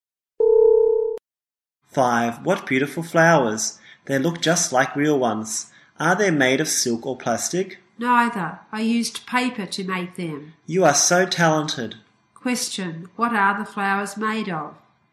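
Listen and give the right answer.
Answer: Paper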